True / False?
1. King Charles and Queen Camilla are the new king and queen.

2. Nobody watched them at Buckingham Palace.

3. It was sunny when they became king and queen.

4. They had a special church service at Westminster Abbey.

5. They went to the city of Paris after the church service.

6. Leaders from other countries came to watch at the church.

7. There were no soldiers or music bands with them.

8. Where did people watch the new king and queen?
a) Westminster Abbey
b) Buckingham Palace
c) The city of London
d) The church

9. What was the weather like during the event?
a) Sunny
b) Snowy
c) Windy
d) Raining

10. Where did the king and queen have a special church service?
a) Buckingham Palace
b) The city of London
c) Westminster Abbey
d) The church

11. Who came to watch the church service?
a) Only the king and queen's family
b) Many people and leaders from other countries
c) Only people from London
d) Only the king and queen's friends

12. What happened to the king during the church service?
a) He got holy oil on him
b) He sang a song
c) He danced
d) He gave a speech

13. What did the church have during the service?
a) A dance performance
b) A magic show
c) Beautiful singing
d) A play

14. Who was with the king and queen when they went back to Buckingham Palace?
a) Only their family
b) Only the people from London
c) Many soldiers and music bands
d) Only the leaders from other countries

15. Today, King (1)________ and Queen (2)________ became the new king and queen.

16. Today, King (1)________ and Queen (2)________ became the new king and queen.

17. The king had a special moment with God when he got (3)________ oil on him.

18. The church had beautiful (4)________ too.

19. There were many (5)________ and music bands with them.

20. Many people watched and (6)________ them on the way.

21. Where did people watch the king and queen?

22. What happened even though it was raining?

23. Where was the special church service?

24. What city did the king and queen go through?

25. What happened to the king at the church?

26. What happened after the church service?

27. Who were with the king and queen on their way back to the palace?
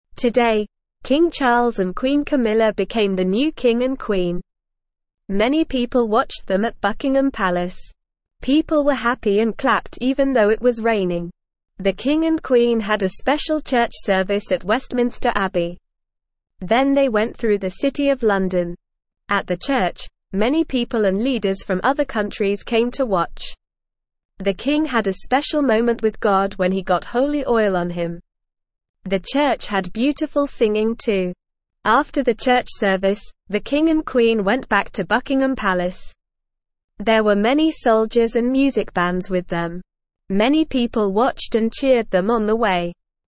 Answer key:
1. True
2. False
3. False
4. True
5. False
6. True
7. False
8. Buckingham Palace
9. Raining
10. Westminster Abbey
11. Many people and leaders from other countries
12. He got holy oil on him
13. Beautiful singing
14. Many soldiers and music bands
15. Charles
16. Camilla
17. holy
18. singing
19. soldiers
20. cheered
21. People watched them at Buckingham Palace.
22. People were happy and clapped even though it was raining.
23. The special church service was at Westminster Abbey.
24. The king and queen went through the city of London.
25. The king had a special moment with God when he got holy oil on him.
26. After the church service, the king and queen went back to Buckingham Palace.
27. Many soldiers and music bands were with the king and queen on their way back to the palace.

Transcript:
Today, King Charles and Queen Camilla became the new king and queen. Many people watched them at Buckingham Palace. People were happy and clapped even though it was raining. The king and queen had a special church service at Westminster Abbey. Then they went through the city of London.
At the church, many people and leaders from other countries came to watch. The king had a special moment with God when he got holy oil on him. The church had beautiful singing too. After the church service, the king and queen went back to Buckingham Palace. There were many soldiers and music bands with them. Many people watched and cheered them on the way.

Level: Level 1

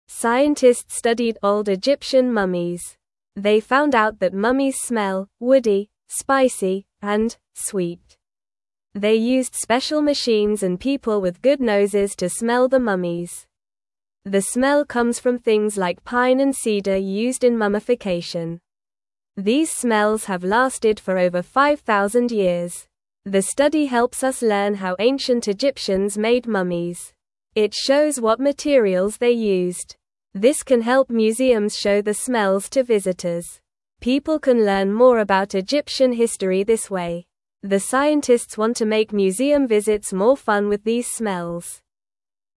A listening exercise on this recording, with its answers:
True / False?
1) These smells have been around for less than 5,000 years.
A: False

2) Museums cannot show these smells to visitors.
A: False

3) Mummies smell like metal, savory, and bitter things.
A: False

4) The scientists want to make visits to museums more fun.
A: True

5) Special machines helped scientists detect the mummies visually.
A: False

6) The study helps us understand how ancient Egyptians made mummies.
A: True

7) The smells come from pine and cedar trees.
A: True

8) Scientists looked at old Egyptian mummies.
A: True

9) What did scientists study?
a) Old books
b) New toys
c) Egyptian mummies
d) Animals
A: Egyptian mummies

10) What did scientists use to smell the mummies?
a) Special machines and good noses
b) Just their hands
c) Loud sounds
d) Bright lights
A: Special machines and good noses

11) What materials were used in mummification?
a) Plastic and metal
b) Pine and cedar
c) Paper and glass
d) Water and sand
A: Pine and cedar

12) What does the study help us learn?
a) How to cook food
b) How to play games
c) How to build houses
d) How ancient Egyptians made mummies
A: How ancient Egyptians made mummies

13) How can museums use the smells?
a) To make food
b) To play music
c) To build toys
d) To show visitors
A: To show visitors

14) What do scientists want to do with the smells in museums?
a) Make them go away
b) Make visits more fun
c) Keep them secret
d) Change the colors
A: Make visits more fun

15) Scientists studied old (1)______ mummies.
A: Egyptian

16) They used (2)______ machines and people with good noses to (3)______ the mummies.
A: special

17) They used (2)______ machines and people with good noses to (3)______ the mummies.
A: smell

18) The smell comes from things like pine and cedar (4)______ in mummification.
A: used

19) These smells have lasted for over 5,000 (5)______.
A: years

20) It (6)______s what materials they used.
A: show

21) This can help museums show the (7)______ to visitors.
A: smells

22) People can learn more about Egyptian (8)______ this way.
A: history

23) Who studied the old Egyptian mummies?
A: Scientists studied the old Egyptian mummies.

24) What special tools did the scientists use to smell the mummies?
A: The scientists used special machines and people with good noses.

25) What things made the mummies smell good?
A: Things like pine and cedar made the mummies smell good.

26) Why is the study important for museums?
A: The study is important because it helps museums show the smells to visitors.

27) How can the smells help people learn about Egyptian history?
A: The smells can help people learn more about how ancient Egyptians made mummies.

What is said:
Scientists studied old Egyptian mummies. They found out that mummies smell "woody," "spicy," and "sweet." They used special machines and people with good noses to smell the mummies. The smell comes from things like pine and cedar used in mummification. These smells have lasted for over 5,000 years.
The study helps us learn how ancient Egyptians made mummies. It shows what materials they used. This can help museums show the smells to visitors. People can learn more about Egyptian history this way. The scientists want to make museum visits more fun with these smells.

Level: Level 1

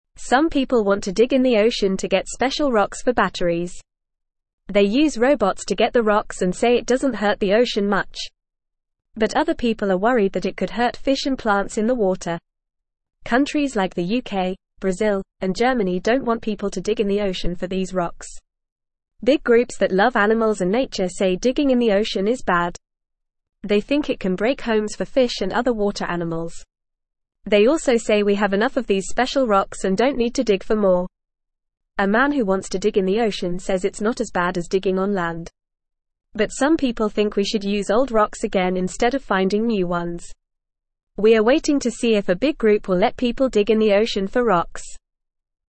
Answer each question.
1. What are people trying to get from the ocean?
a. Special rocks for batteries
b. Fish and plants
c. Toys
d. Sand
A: Special rocks for batteries

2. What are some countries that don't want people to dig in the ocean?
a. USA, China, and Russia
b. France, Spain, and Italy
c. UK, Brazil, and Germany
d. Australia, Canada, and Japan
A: UK, Brazil, and Germany

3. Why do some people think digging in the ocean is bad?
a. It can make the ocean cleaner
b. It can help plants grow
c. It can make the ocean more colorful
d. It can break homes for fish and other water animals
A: It can break homes for fish and other water animals

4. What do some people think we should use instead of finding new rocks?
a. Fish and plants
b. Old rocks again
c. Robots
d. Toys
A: Old rocks again

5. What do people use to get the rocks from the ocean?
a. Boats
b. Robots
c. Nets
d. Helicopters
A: Robots

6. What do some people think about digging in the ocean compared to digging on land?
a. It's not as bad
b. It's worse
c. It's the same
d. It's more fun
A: It's not as bad

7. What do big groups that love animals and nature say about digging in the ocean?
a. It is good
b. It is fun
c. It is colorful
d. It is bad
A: It is bad

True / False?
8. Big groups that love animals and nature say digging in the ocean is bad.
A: True

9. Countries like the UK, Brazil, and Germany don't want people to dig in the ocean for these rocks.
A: True

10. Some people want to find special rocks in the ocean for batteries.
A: True

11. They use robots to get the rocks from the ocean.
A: True

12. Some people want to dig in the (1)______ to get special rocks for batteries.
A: ocean

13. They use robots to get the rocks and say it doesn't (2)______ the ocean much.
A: hurt

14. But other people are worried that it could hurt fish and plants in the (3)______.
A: water

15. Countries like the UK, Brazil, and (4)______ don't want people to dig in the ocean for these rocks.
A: Germany

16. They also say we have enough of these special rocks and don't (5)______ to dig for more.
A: need

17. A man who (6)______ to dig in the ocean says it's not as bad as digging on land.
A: wants

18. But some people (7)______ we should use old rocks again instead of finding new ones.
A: think

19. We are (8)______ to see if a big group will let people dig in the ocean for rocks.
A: waiting

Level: Level 1

